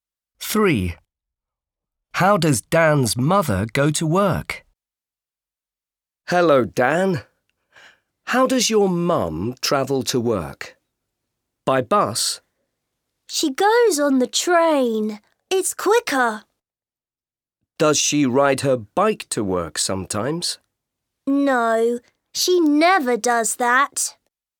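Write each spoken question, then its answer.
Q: How does Dan's mother go to work?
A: by train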